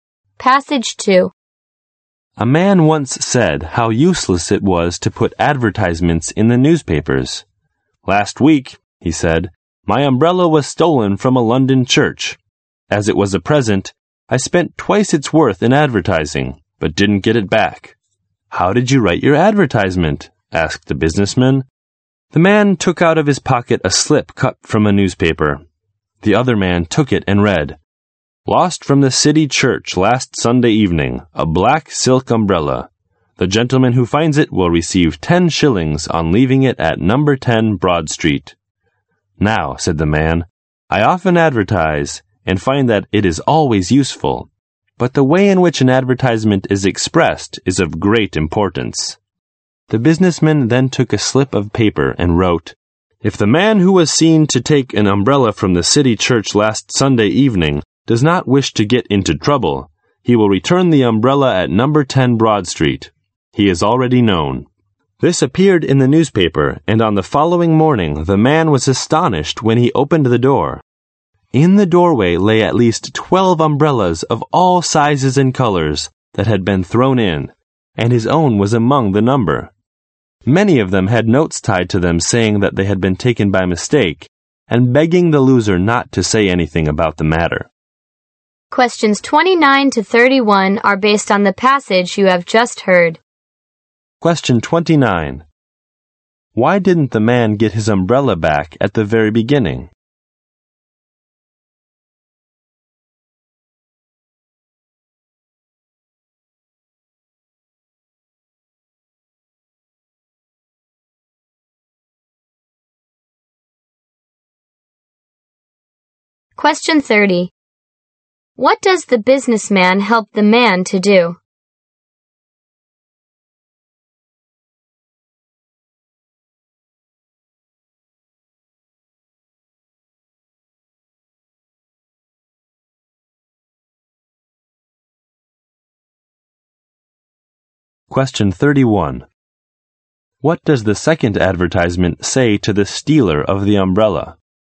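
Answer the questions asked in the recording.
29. His advertisement was badly worded.
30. Write a better advertisement.
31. He is already known and should return the umbrella to 10 Broad Street or he will get into trouble.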